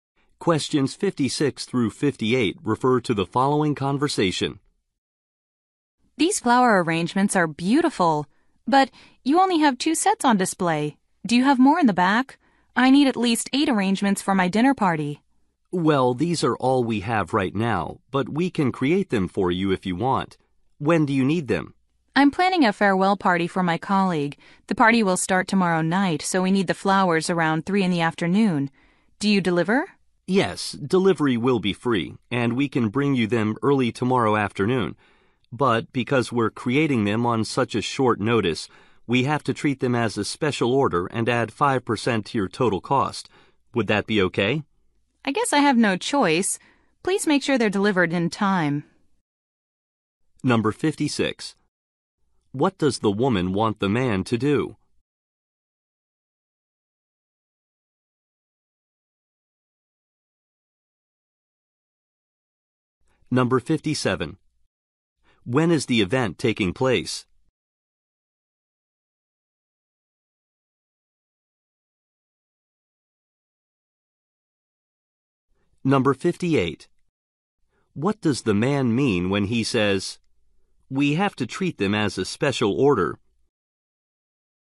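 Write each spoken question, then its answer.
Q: What does the woman want the man to do?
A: Make 8 flower arrangements

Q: When is the event taking place?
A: Tomorrow night

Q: What does the man mean when he says, "We have to treat them as a special order"?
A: An extra 5% charge will be added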